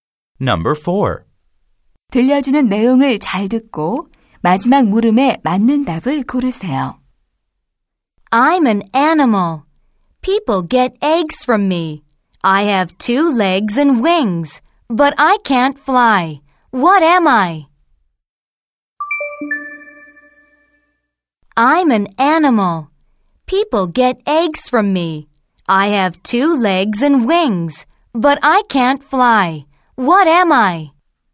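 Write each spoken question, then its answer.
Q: What am I?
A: a chicken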